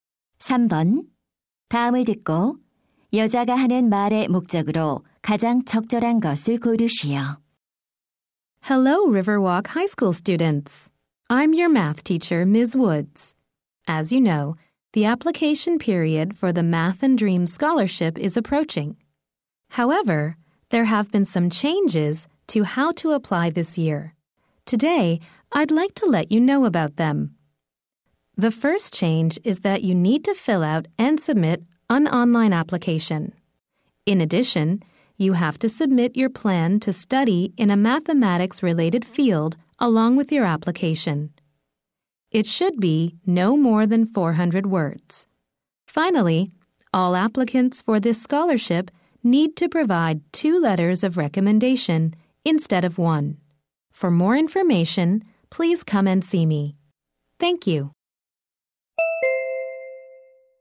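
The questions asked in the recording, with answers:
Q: 다음을 듣고 여자가 하는 말의 목적으로 가장 적절한 것을 고르시오.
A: 수학 장학금 신청 방법의 변경 사항을 안내하려고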